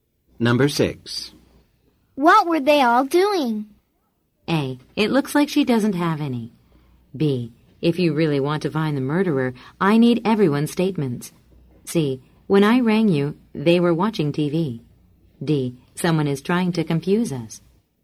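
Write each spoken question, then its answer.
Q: What were they all doing?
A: C: When I rang you, they were watching TV.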